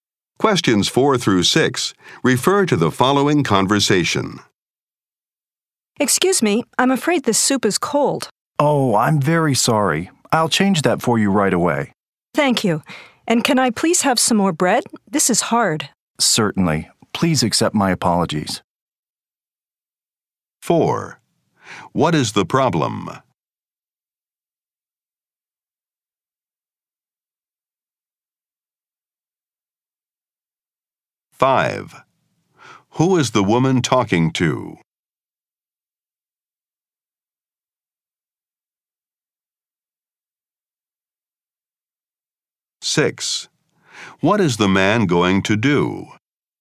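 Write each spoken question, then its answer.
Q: What is the problem?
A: The soup is cold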